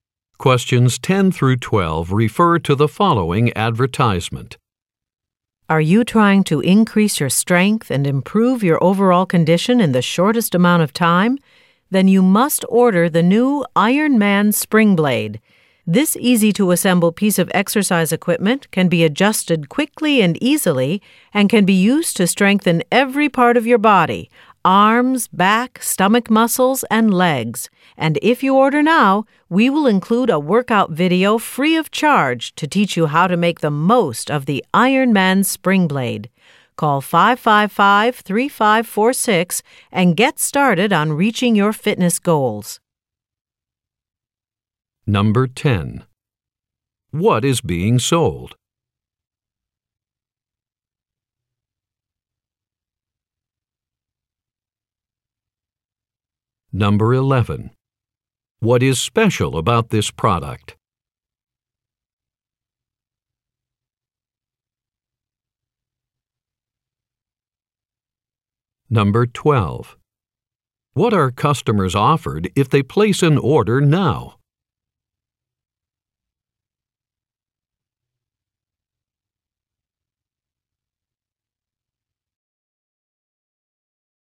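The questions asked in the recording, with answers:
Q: What is being sold?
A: Exercise equipment (the Iron Man Spring Blade)

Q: What are customers offered if they place an order now?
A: A free workout video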